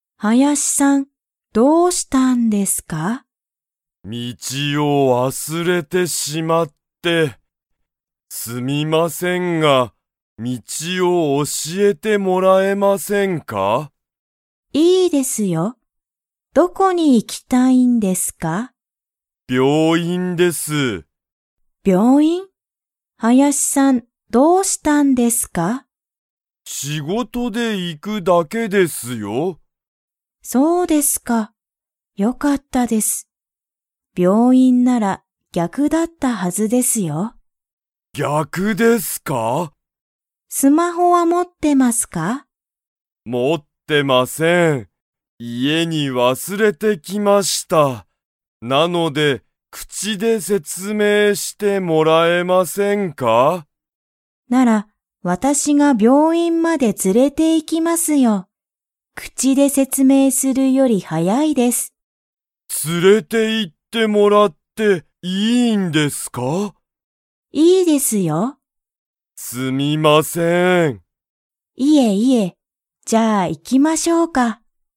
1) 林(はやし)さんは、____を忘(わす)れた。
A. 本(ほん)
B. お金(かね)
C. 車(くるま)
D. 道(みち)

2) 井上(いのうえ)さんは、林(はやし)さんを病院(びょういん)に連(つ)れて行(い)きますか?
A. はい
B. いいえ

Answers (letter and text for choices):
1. D. 道(みち)
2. A. はい

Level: Level 2